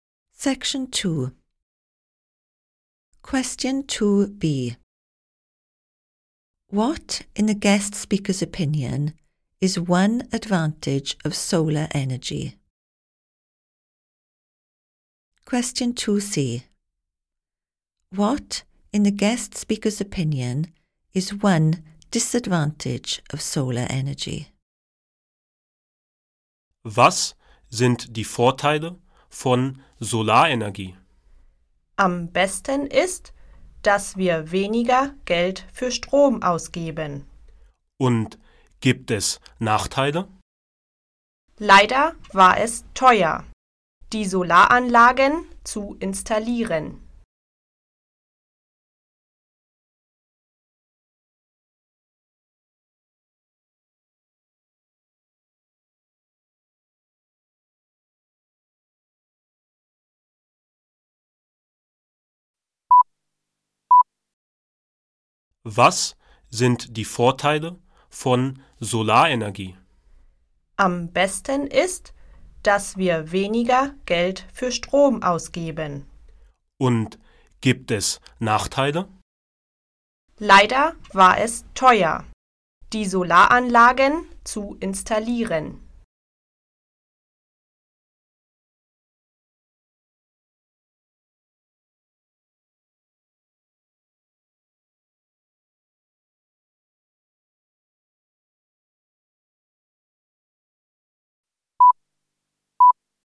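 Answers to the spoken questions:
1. They spend less money on electricity
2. It was expensive to install the solar panels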